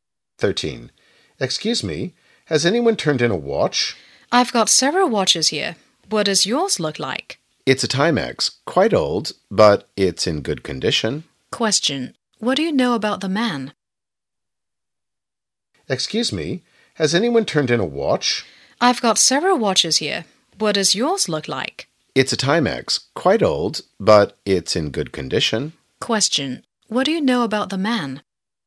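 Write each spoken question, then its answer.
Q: What do you know about the man?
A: He lost his watch, an old Timex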